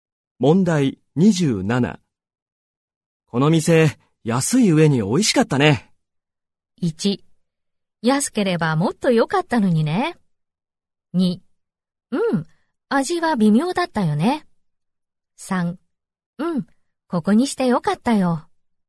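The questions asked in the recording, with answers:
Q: この店、安い上に美味しかったね。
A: 3: うん、ここにしてよかったよ。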